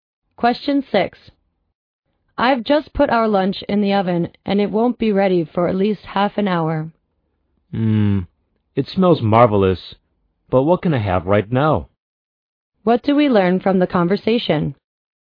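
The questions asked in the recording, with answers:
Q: What do we learn from the conversation?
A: The man is hungry and wants something to eat right now.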